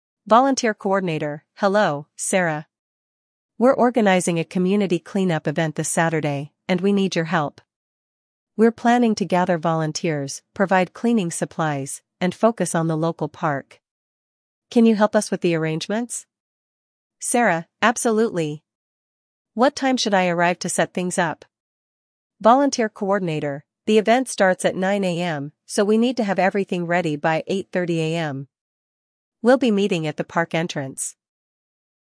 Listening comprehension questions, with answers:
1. What is the event Sarah is helping to organize?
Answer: The community clean-up event.

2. What time does the event start?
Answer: 9:00 AM.

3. Where will the event take place?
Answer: At the local park.

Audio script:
Volunteer Coordinator: Hello, Sarah. We're organizing a community clean-up event this Saturday, and we need your help. We're planning to gather volunteers, provide cleaning supplies, and focus on the local park. Can you help us with the arrangements?
Sarah: Absolutely! What time should I arrive to set things up?
Volunteer Coordinator: The event starts at 9:00 AM, so we need to have everything ready by 8:30 AM. We'll be meeting at the park entrance.